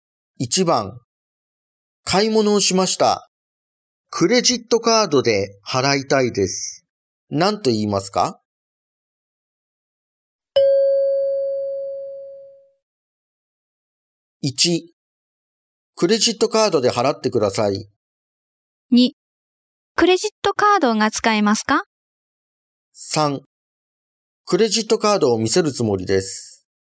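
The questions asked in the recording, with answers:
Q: 何と言いますか?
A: 2: クレジットカードが使えますか?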